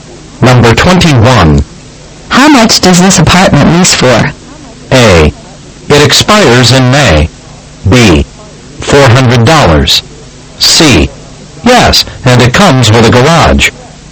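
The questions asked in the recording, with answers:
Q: How much does this apartment lease for?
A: B: $400.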